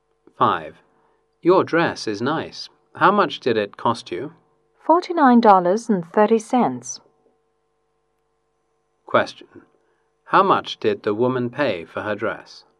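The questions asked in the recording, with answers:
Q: How much did the woman pay for her dress?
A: $49.30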